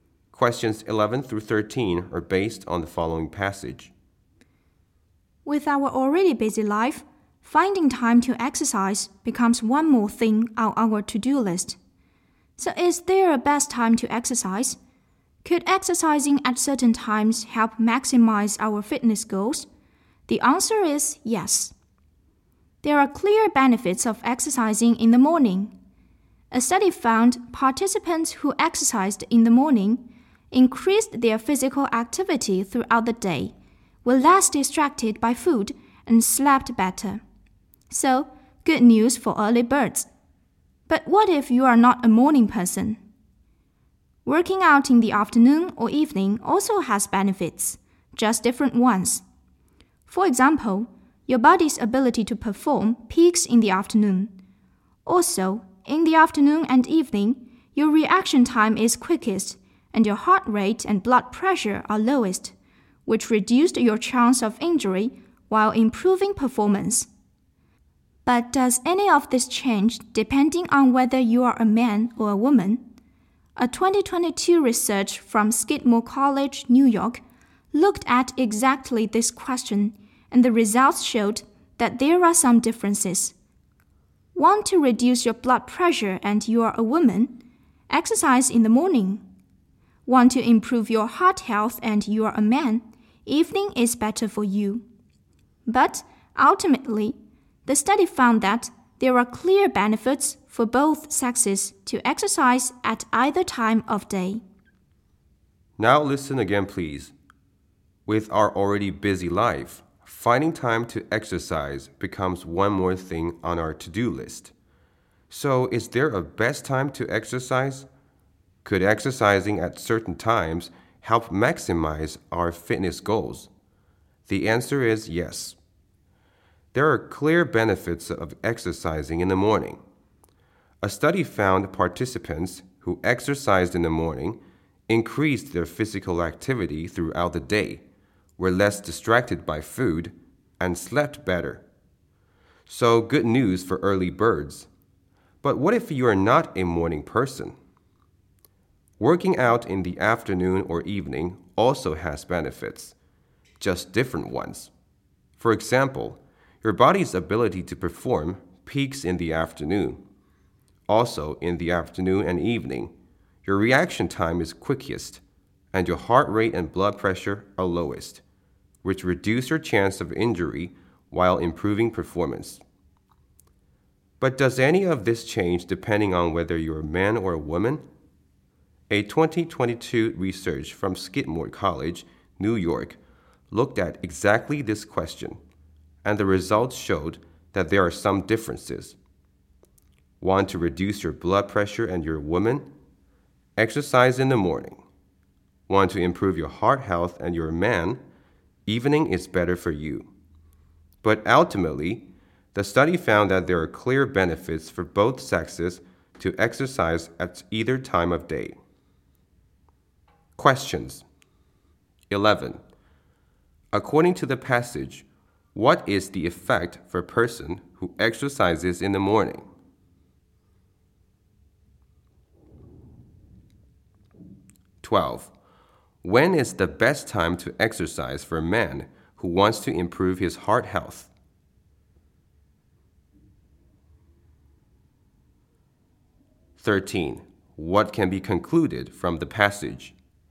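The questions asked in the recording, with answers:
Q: According to the passage, what is the effect for a person who exercises in the morning?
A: More activity all day, less distracted by food, better sleep

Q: When is the best time to exercise for a man who wants to improve his heart health?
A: In the evening

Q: What can be concluded from the passage?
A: Exercising at either time of day benefits both sexes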